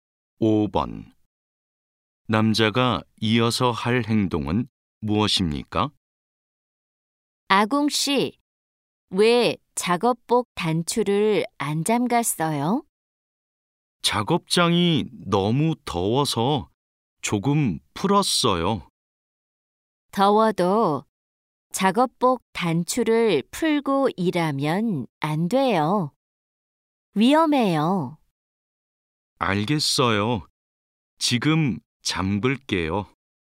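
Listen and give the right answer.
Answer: 작업복 단추를 잠근다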